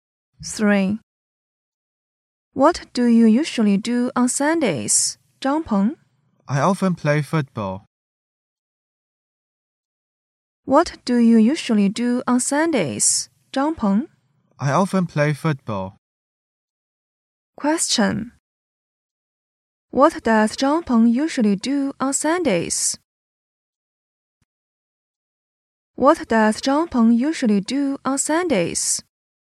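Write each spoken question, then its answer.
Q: What does Zhang Peng usually do on Sundays?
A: He often plays football.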